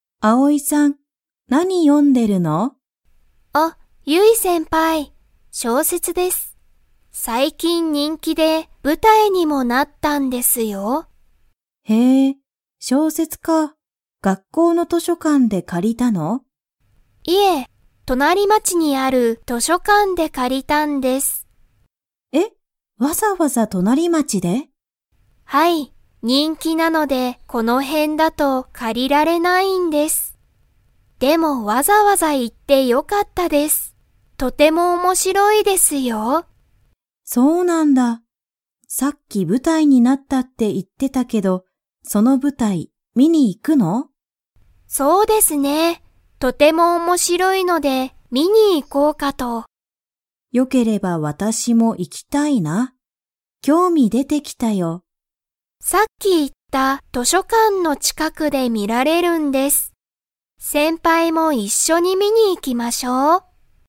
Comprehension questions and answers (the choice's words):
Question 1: あおいさんは、小説しょうせつを の図書館としょかんで借かりた。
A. 学校がっこう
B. 人気にんき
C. 隣町となりまち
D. 近ちかく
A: 隣町となりまち

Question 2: ゆいさんは、舞台ぶたいを見みに 。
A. 行いきたい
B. 行いきたくない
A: 行いきたい

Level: Level 4